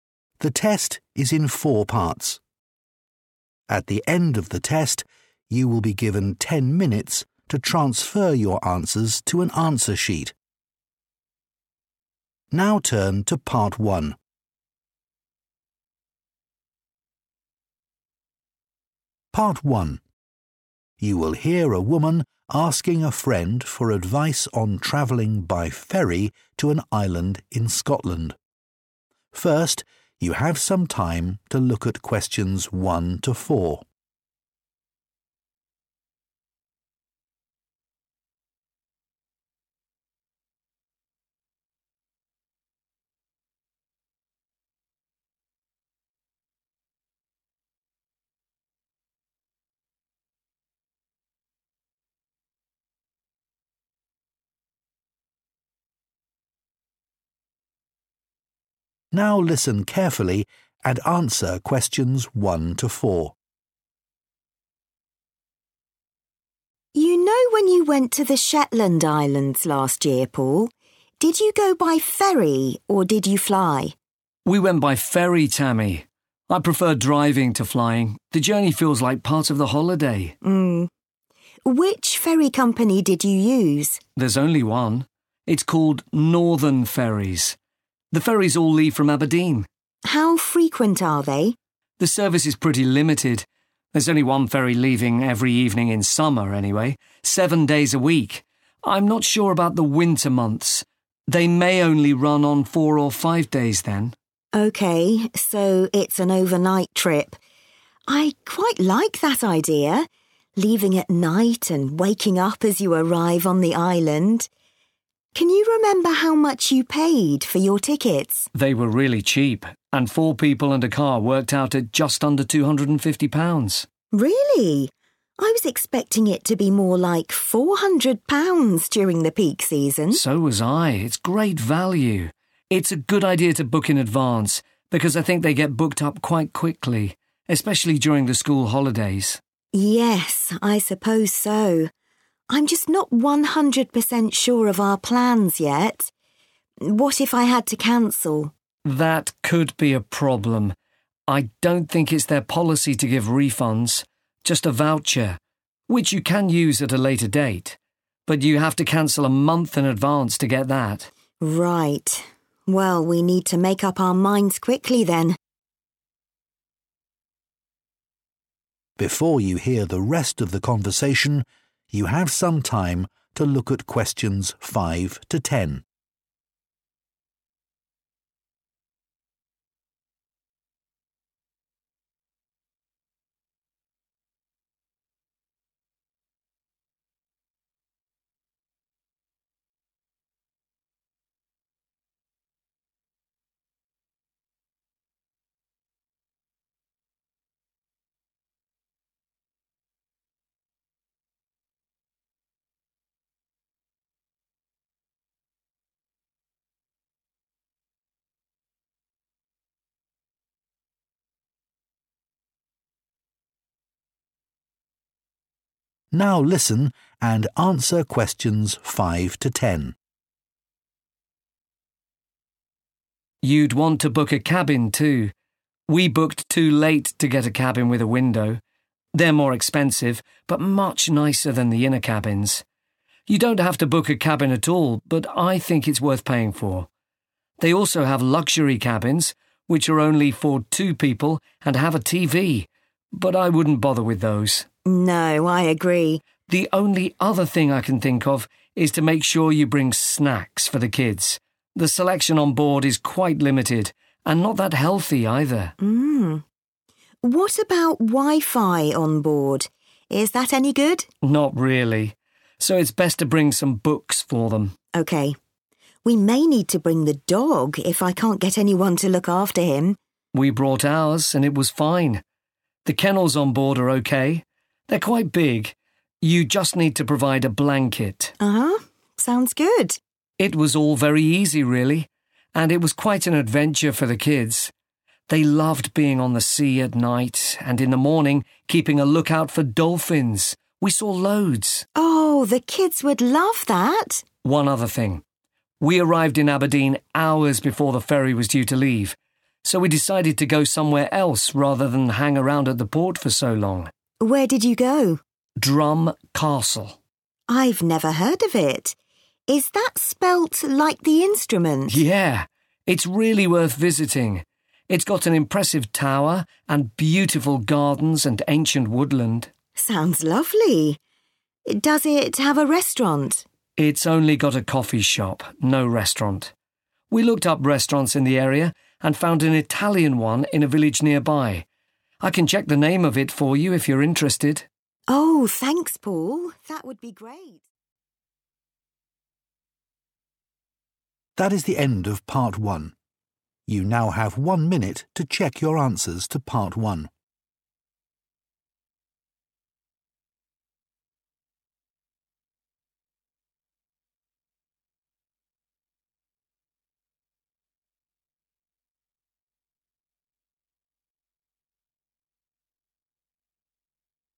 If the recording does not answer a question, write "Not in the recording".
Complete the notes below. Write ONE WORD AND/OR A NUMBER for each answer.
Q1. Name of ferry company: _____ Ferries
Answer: Northern

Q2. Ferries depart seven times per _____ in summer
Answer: week

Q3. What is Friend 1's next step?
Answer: Not in the recording

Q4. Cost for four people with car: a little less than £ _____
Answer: 250

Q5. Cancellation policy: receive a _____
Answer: voucher

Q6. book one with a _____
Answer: window

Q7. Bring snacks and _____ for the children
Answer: books

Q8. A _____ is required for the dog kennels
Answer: blanket

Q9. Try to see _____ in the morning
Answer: dolphins

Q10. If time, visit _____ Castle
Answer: Drum

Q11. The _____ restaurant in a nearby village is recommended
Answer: Italian

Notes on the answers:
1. The correct answer is Northern because Paul explains that there is a single boat service available and tells Tammy its full name when she asks about the company he used.
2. The correct answer is "week" because Paul describes the summer schedule for the ferry service. He explains that one boat leaves every evening, which means the ferry departs seven times during one week.
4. The correct answer is derived from the conversation where Paul mentions the total cost for four people and a car was 'just under £250'. In the notes, the phrase 'a little less than' is a synonym for 'just under', which confirms that the number requested for the gap is 250.
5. The correct answer is 'voucher' because Paul explains the ferry company's rules for when someone cannot go on their trip. He says they do not give cash back (a refund). Instead, they provide a credit you can spend another time, provided you tell them at least one month before your travel date.
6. The correct answer is "window" because Paul explains that he wanted a cabin where he could see the ocean. He says that his family waited too long to book, so they did not get a cabin with a window. He recommends getting one because they are much better than cabins that are inside the ship.
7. The correct answer is derived from Paul's advice regarding entertainment. He mentions that the internet service (wifi) is poor, so he recommends bringing books to keep the children busy during the trip.
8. The correct answer is 'blanket' because Paul describes the experience of bringing a dog on the ferry. He mentions that while the ship has kennels (small rooms or cages) for the dogs, it is necessary to bring your own blanket for the animal to use. The word 'provide' in the text indicates that the ferry company does not give you one.
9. The correct answer is 'dolphins' because Paul highlights this as a highlight of the boat trip for his children. He mentions that during the morning part of their journey, the kids stayed busy by watching the water to spot these animals, and they were successful in seeing many of them. This makes it a recommended activity for someone traveling with children.
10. The correct answer is confirmed when Paul mentions that his family had extra time before their ferry left. Instead of waiting at the port, they decided to go to a nearby attraction. When Tammy asks for the name of the place, Paul identifies it as "Drum Castle." He describes it as a place with a tall tower, pretty gardens, and very old trees, making it a good suggestion for Tammy's trip.
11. The correct answer is based on Paul's description of his trip. When talking about where they ate near the castle, he mentions finding an Italian restaurant in a village close to Aberdeen. Using the word "Italian" identifies which specific type of restaurant was found.

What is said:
TAMMY: You know when you went to the Shetland Islands last year, Paul? Did you go by ferry or did you fly?
PAUL: We went by ferry, Tammy. I prefer driving to flying – the journey feels like part of the holiday.
TAMMY: Mmm. Which ferry company did you use?
PAUL: There's only one – it's called Northern Ferries. The ferries all leave from Aberdeen.
TAMMY: How frequent are they?
PAUL: The service is pretty limited – there's only one ferry leaving every evening in summer anyway, seven days a week – I'm not sure about the winter months. They may only run on four or five days then.
TAMMY: OK. So it's an overnight trip. I quite like that idea. Leaving at night and waking up as you arrive on the island. Can you remember how much you paid for your tickets?
PAUL: They were really cheap and four people and a car worked out at just under £250.
TAMMY: Really? I was expecting it to be more like £400 during the peak season.
PAUL: So was I. It's great value. It's a good idea to book in advance because I think they get booked up quite quickly – especially during the school holidays.
TAMMY: Yes, I suppose so. I'm just not 100% sure of our plans yet. What if I had to cancel?
PAUL: That could be a problem. I don't think it's their policy to give refunds – just a voucher – which you can use at a later date. But you have to cancel a month in advance to get that.
TAMMY: Right. Well we need to make up our minds quickly then.
PAUL: You'd want to book a cabin too. We booked too late to get a cabin with a window. They're more expensive but much nicer than the inner cabins. You don't have to book a cabin at all but I think it's worth paying for. They also have luxury cabins, which are only for two people and have a TV – but I wouldn't bother with those.
TAMMY: No, I agree.
PAUL: The only other thing I can think of is to make sure you bring snacks for the kids. The selection on board is quite limited and not that healthy either.
TAMMY: Mmm. What about wifi on board? Is that any good?
PAUL: Not really. So it's best to bring some books for them.
TAMMY: OK. We may need to bring the dog if I can't get anyone to look after him.
PAUL: We brought ours and it was fine. The kennels on board are OK – they're quite big – you just need to provide a blanket.
TAMMY: Uhuh. Sounds good.
PAUL: It was all very easy really – and it was quite an adventure for the kids. They loved being on the sea at night and in the morning keeping a lookout for dolphins – we saw loads.
TAMMY: Oh, the kids would love that!
PAUL: One other thing. We arrived in Aberdeen hours before the ferry was due to leave so we decided to go somewhere else rather than hang around at the port for so long.
TAMMY: I've never heard of it. Is that spelt like the instrument?
PAUL: Yeah. It's really worth visiting. It's got an impressive tower and beautiful gardens and ancient woodland.
TAMMY: Sounds lovely. Does it have a restaurant?
PAUL: It's only got a coffee shop – no restaurant. We looked up restaurants in the area and found an Italian one in a village nearby. I can check the name of it for you if you're interested.
TAMMY: Oh thanks Paul that would be ....